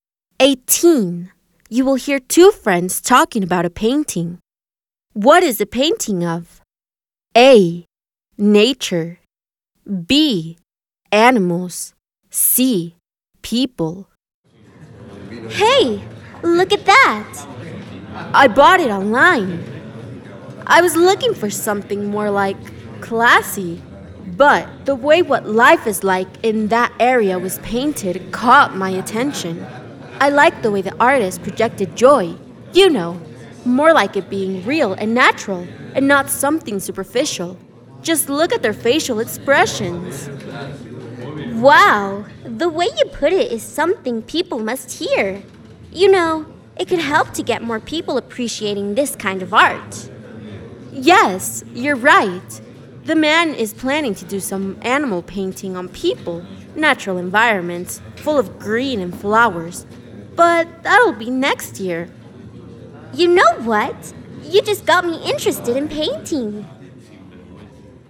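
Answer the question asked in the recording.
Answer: C: People.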